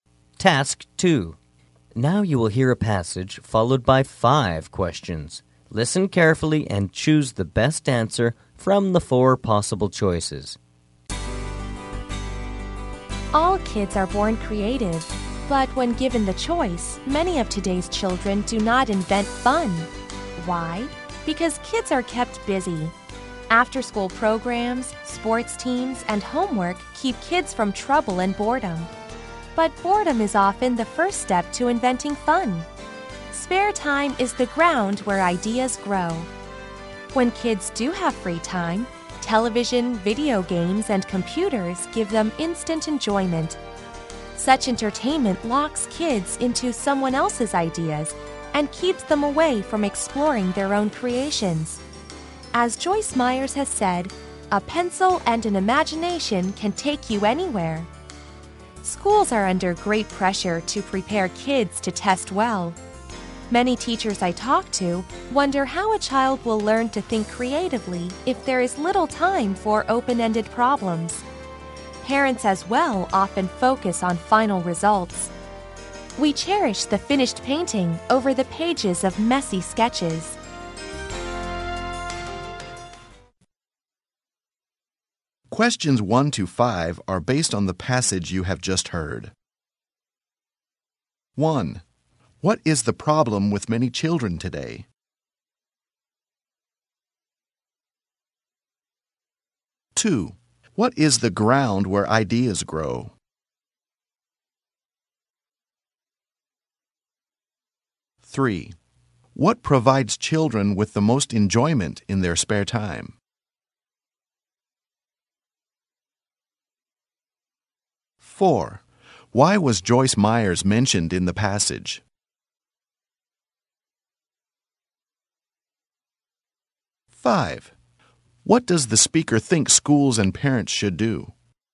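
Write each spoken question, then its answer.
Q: What is the problem with many children today?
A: They are kept busy and do not invent fun

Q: What is the ground where ideas grow?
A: Spare time

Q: What provides children with the most enjoyment in their spare time?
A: Television, video games and computers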